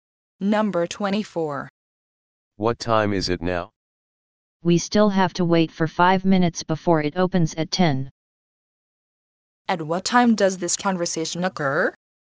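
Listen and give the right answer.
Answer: 9:55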